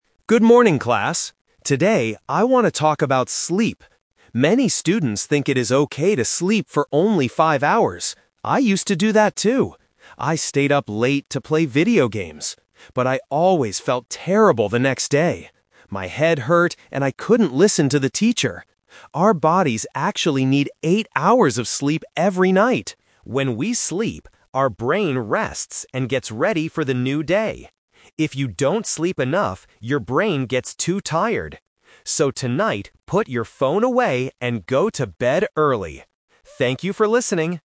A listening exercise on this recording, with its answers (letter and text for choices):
Listen to a student giving a presentation to his class. Choose the correct answer (A, B, or C) for each question.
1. What did the speaker use to do late at night?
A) Study for his classes.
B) Play video games.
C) Sleep for eight hours.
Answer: B) Play video games.

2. How did the speaker feel the next day after sleeping for five hours?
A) He felt very bad and his head hurt.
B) He felt angry at his teacher.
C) He felt ready for the new day.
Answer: A) He felt very bad and his head hurt.

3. What does the speaker tell the class to do tonight?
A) Turn off their phones and go to sleep early.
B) Call their friends on the phone.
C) Do their homework before going to bed.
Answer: A) Turn off their phones and go to sleep early.

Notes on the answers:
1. The speaker says, "I stayed up late to play video games."
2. The speaker says, "But I always felt terrible the next day. My head hurt..."
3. At the end of the presentation, the speaker clearly says: "put your phone away and go to bed early!"

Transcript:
Student: Good morning, class. Today, I want to talk about sleep. Many students think it is okay to sleep for only five hours. I used to do that, too. I stayed up late to play video games. But I always felt terrible the next day. My head hurt, and I couldn't listen to the teacher.
Our bodies actually need eight hours of sleep every night. When we sleep, our brain rests and gets ready for the new day. If you don't sleep enough, your brain gets too tired. So, tonight, put your phone away and go to bed early! Thank you for listening.